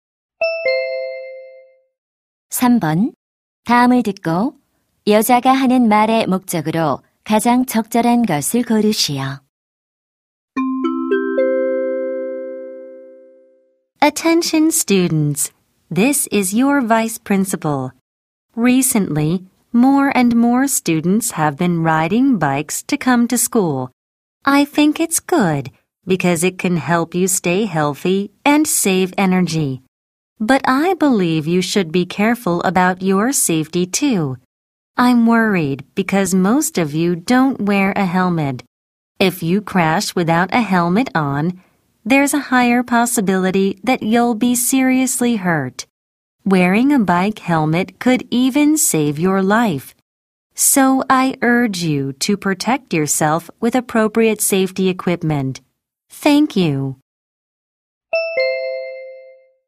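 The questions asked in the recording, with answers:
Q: 다음을 듣고 여자가 하는 말의 목적으로 가장 적절한 것을 고르시오.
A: 자전거 탈 때 헬멧 착용을 권장하려고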